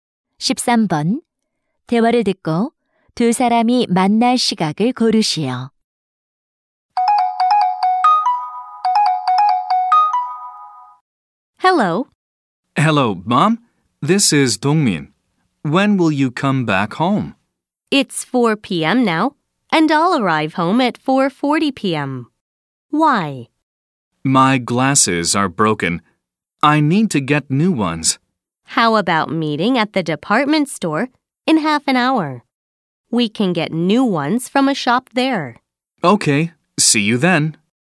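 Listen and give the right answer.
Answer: 오후 4시 30분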